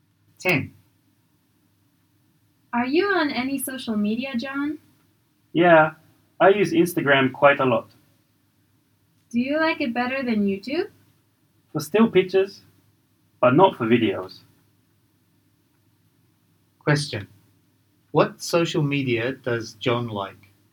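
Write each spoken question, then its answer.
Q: What social media does John like?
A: Instagram for still pictures, YouTube for videos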